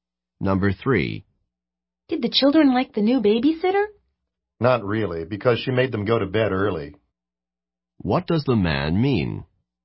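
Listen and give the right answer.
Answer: The babysitter made the children go to bed early, so they didn't like her.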